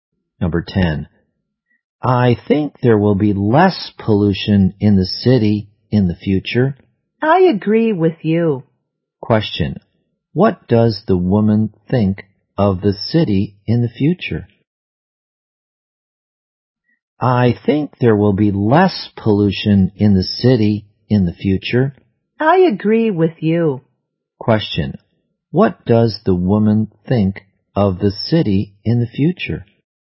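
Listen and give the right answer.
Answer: There will be less pollution.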